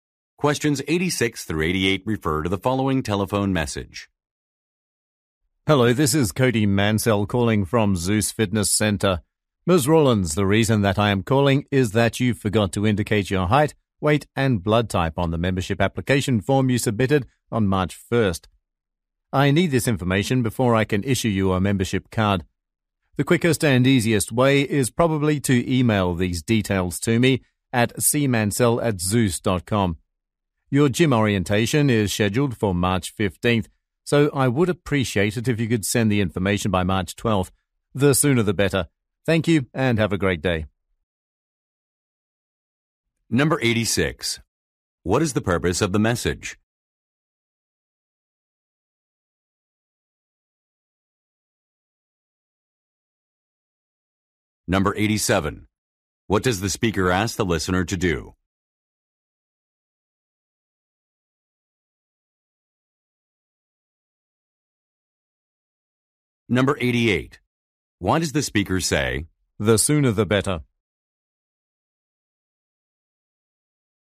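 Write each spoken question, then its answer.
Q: What is the purpose of the message?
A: To request missing information from a membership application

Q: What does the speaker ask the listener to do?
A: Email her height, weight and blood type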